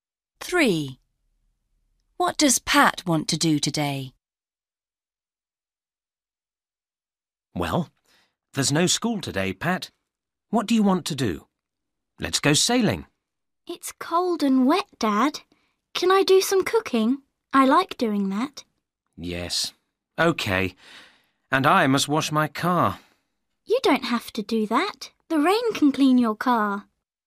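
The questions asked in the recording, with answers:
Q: What does Pat want to do today?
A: Do some cooking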